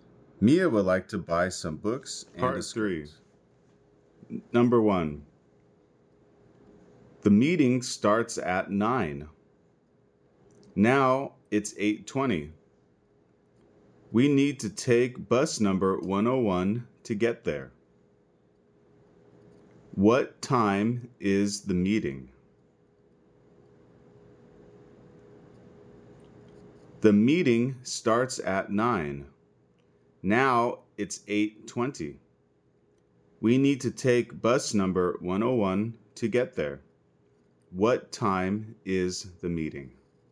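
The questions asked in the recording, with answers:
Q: What time is the meeting?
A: At 9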